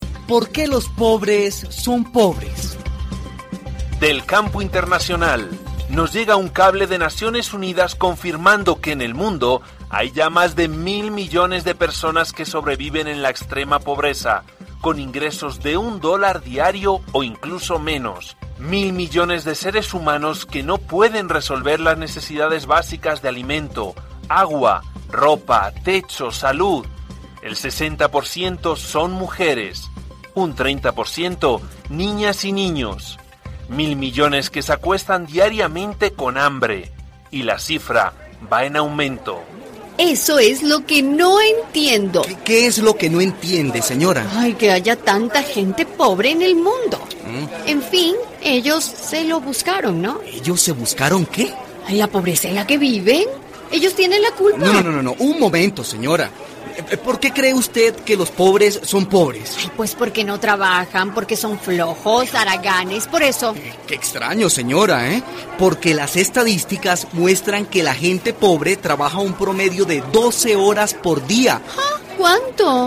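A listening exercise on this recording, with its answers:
COMPRENSIÓN AUDITIVA. Después de escuchar el audio, elige la respuesta correcta.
¿Qué argumento presenta el locutor para contradecir la afirmación de la señora de que los pobres son pobres porque no trabajan?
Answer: Que, según las estadísticas, la gente pobre trabaja un promedio de 12 horas al día.

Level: intermediate level B1-B2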